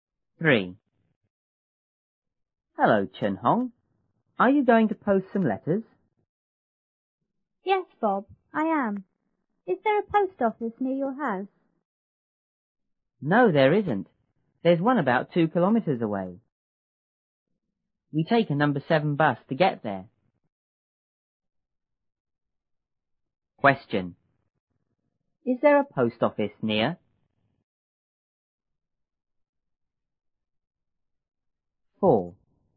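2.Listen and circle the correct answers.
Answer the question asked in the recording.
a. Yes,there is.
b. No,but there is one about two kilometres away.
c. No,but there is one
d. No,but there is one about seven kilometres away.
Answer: b. No,but there is one about two kilometres away.

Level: 初中英语广州版1B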